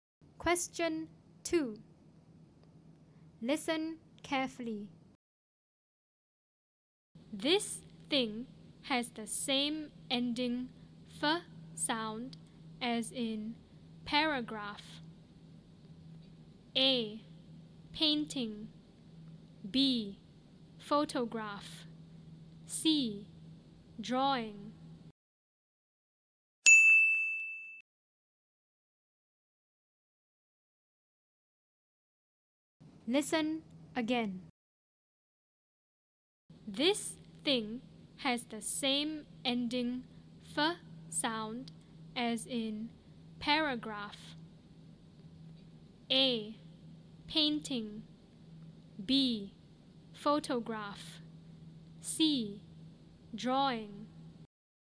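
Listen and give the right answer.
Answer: B: Photograph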